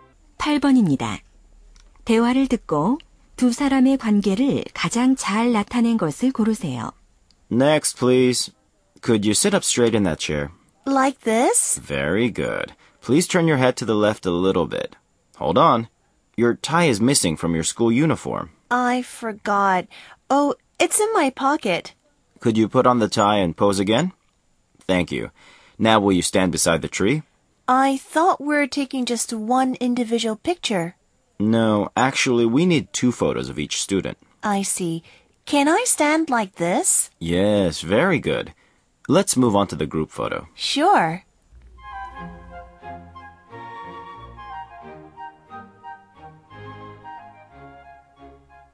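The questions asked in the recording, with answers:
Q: 대화를 듣고 두 사람의 관계를 가장 잘 나타낸 것을 고르세요.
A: 사진사 - 학생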